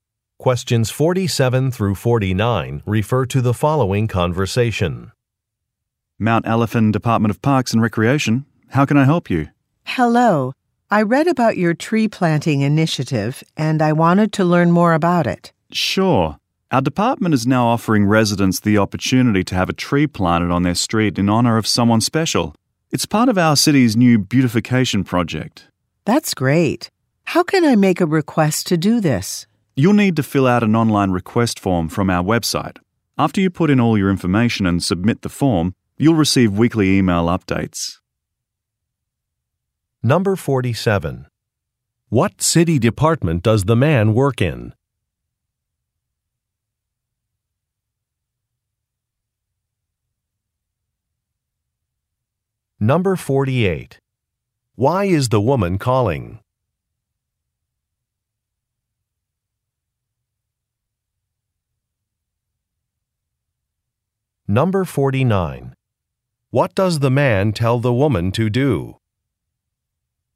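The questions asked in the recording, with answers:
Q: What city department does the man work in?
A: Parks and Recreation

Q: Why is the woman calling?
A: To learn more about the tree planting initiative

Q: What does the man tell the woman to do?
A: Fill out an online request form on the website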